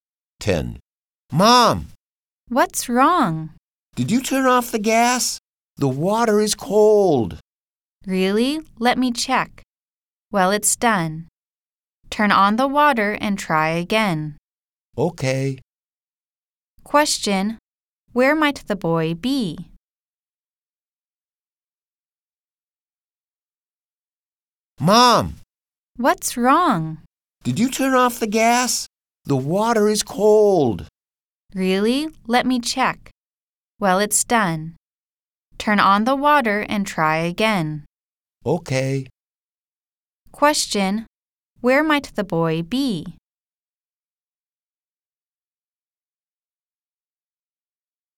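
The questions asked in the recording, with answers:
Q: Question: Where might the boy be?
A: In the bathroom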